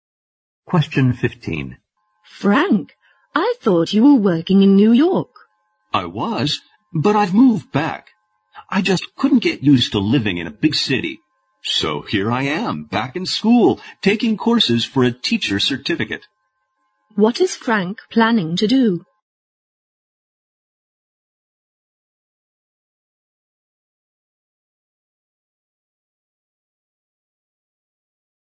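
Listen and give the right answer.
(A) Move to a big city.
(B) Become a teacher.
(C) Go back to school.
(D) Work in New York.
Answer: (B) Become a teacher.

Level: 四级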